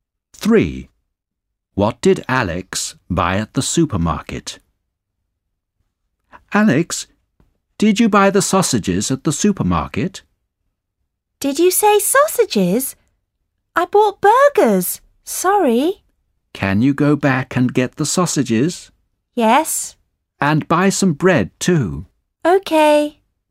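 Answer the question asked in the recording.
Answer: Burgers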